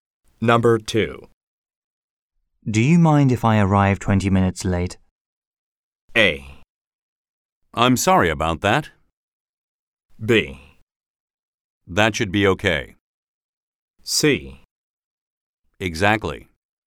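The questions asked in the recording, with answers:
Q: Do you mind if I arrive 20 minutes late?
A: B: That should be okay.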